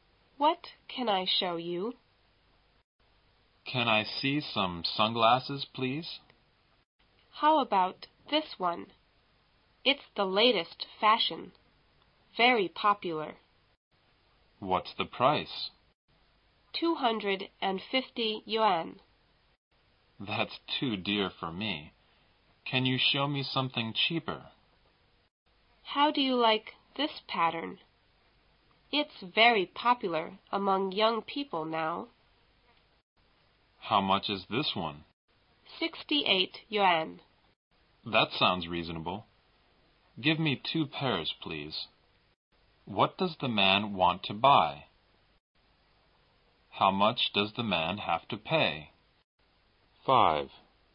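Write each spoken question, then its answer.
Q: What does the man want to buy?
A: Sunglasses

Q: How much does the man have to pay?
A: 136 yuan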